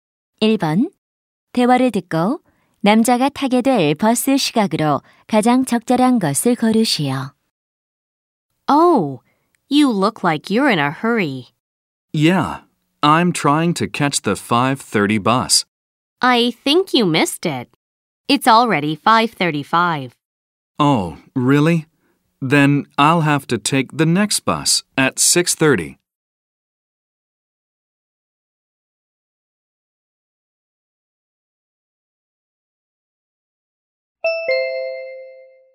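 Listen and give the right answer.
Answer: 6시 30분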